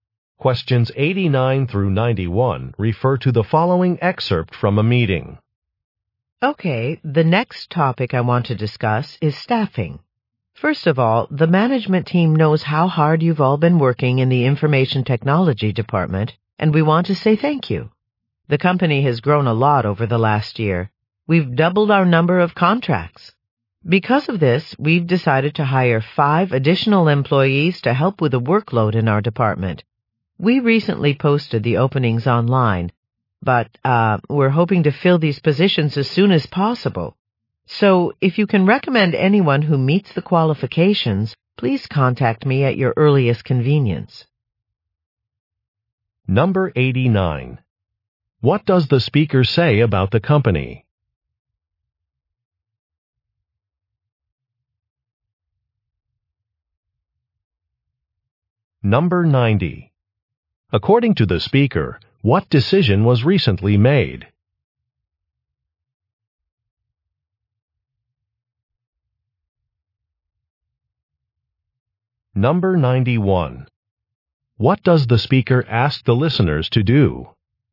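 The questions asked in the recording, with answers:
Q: What does the speaker say about the company?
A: It has grown a lot and doubled its contracts

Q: According to the speaker, what decision was recently made?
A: To hire five more employees

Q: What does the speaker ask the listeners to do?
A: Recommend qualified candidates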